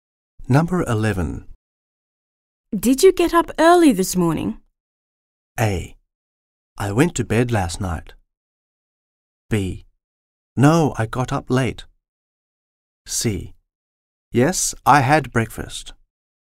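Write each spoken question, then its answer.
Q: Did you get up early this morning?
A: B: No, I got up late.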